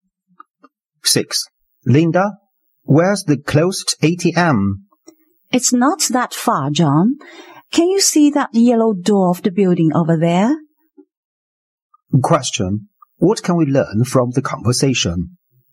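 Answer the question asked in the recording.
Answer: The ATM is nearby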